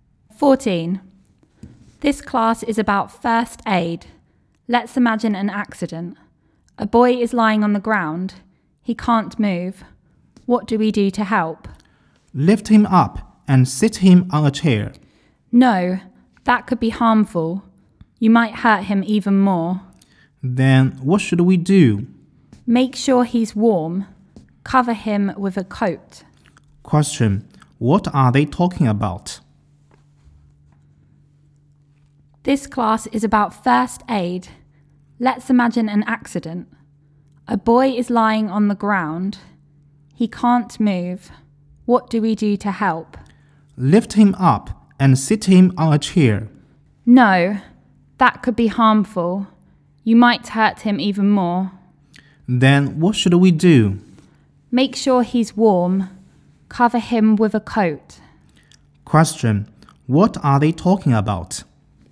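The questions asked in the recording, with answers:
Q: what are they talking about?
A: First aid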